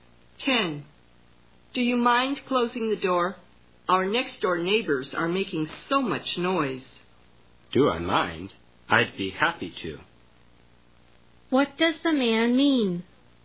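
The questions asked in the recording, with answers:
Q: What does the man mean?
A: He will gladly close the door.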